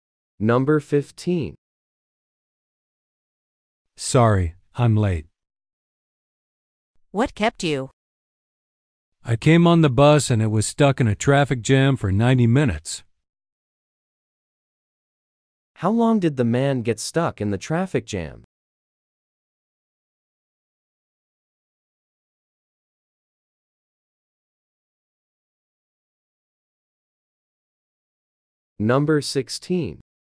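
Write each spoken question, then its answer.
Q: How long did the man get stuck in the traffic jam?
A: 90 minutes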